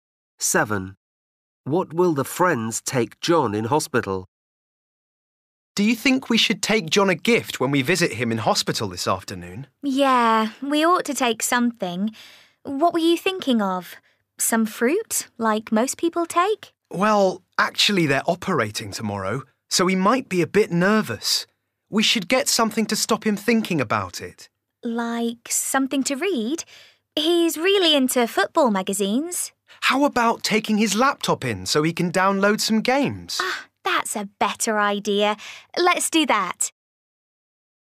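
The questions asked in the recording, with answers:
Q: What will the friends take John in hospital?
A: his laptop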